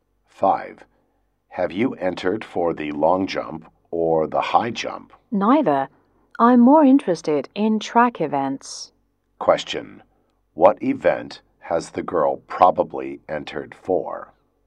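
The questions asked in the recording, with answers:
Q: What event has the girl probably entered for?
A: A track event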